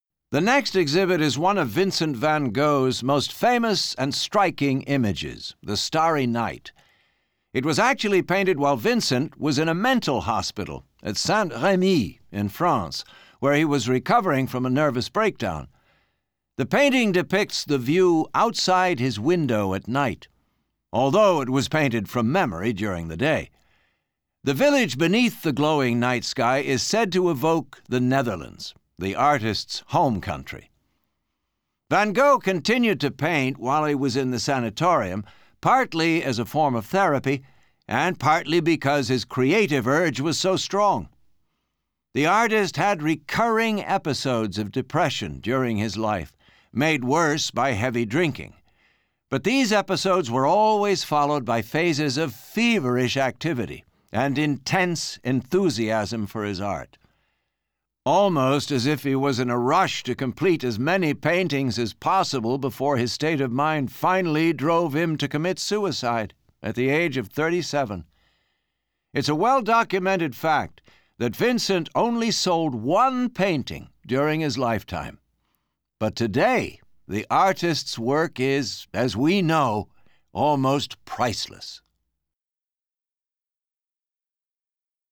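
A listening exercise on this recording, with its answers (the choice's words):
Kuuntele teksti täältä ja vastaa alla oleviin kysymyksiin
'The Starry Night' depicts what Van Gogh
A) saw from his window in the Netherlands.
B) dreamt about at night.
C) remembered about the night-time scene from his window.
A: remembered about the night-time scene from his window.

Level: Course 3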